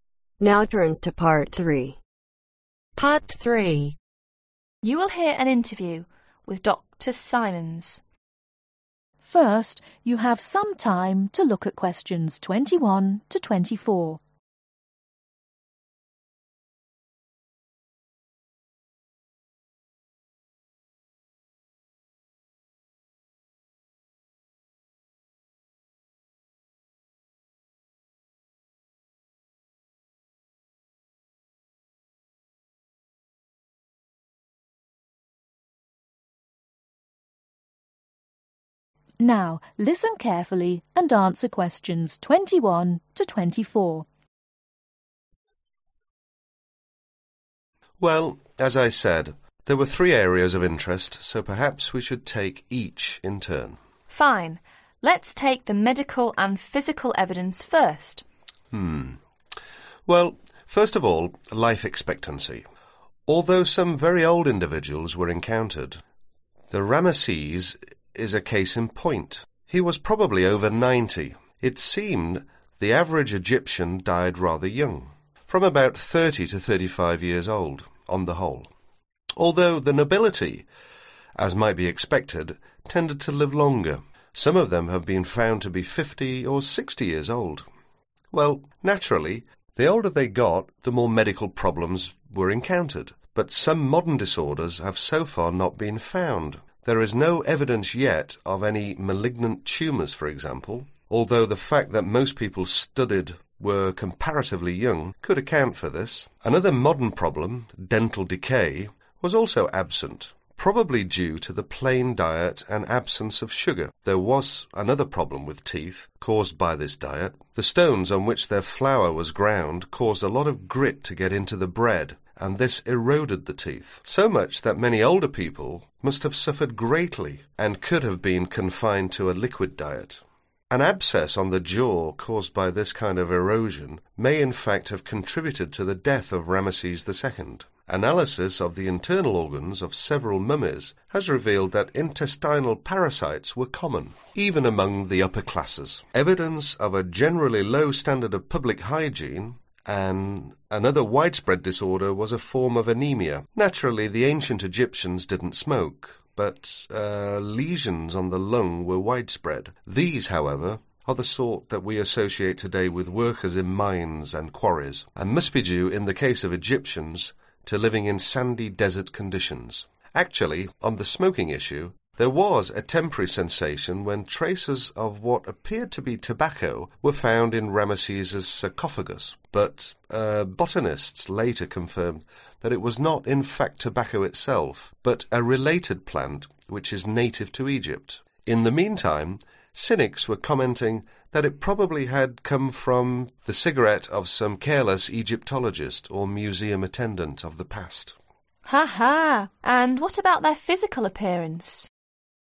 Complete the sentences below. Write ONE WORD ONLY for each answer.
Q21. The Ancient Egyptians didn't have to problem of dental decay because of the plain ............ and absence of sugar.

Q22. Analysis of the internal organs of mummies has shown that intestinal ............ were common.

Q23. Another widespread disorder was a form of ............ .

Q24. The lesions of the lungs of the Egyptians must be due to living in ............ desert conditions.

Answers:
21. Diet
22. Parasites
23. Anemia
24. Sandy